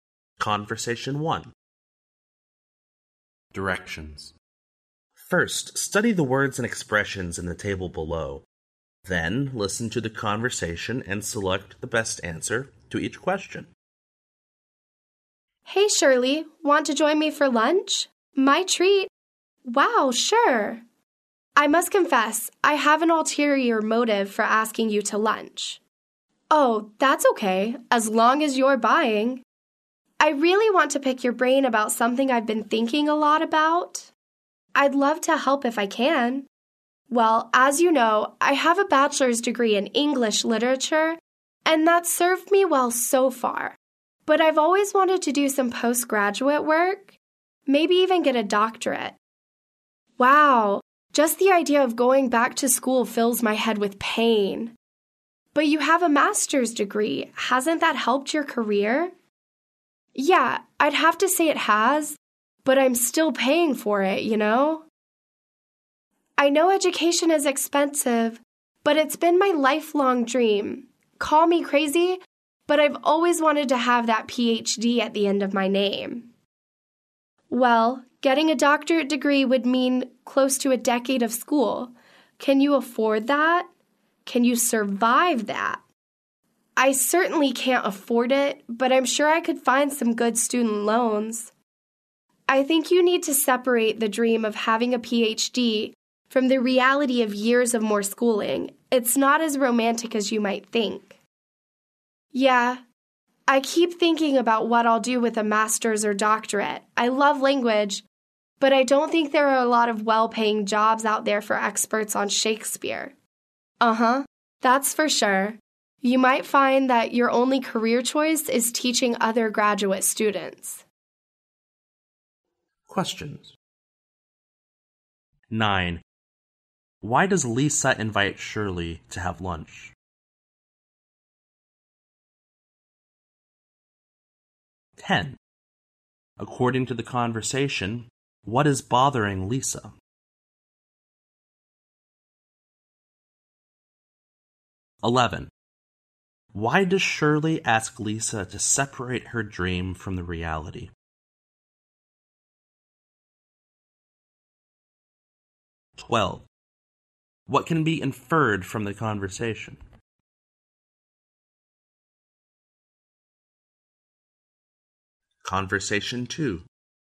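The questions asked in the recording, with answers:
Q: Why does Lisa invite Shirley to have lunch?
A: To ask her advice about doing postgraduate study

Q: Why does Shirley ask Lisa to separate her dream from the reality?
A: A doctorate would mean close to a decade of costly schooling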